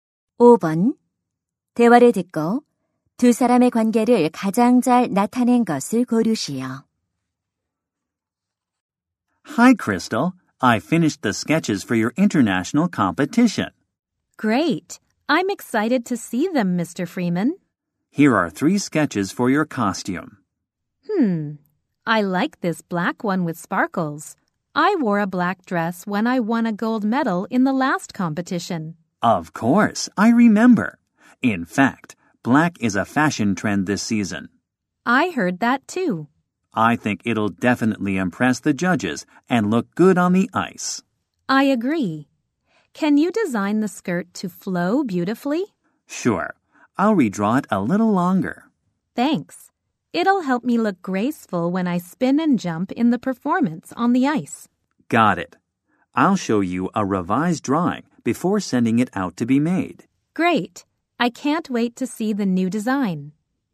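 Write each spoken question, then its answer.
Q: 대화를 듣고 두 사람의 관계를 가장 잘 나타낸 것을 고르시오.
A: 의상 디자이너 - 피겨 스케이팅 선수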